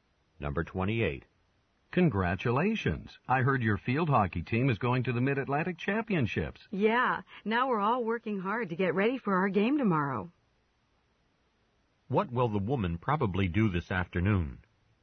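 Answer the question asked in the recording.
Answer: Practice field hockey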